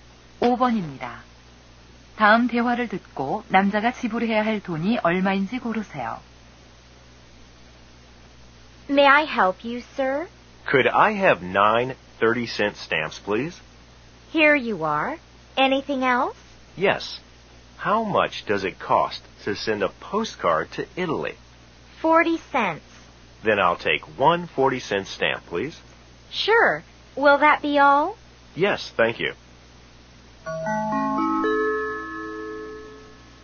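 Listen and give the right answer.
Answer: 3달러 10센트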